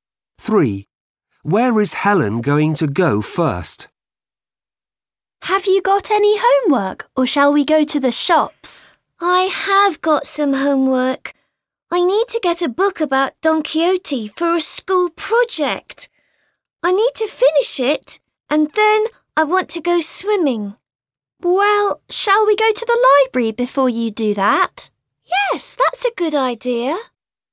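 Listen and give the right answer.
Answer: the library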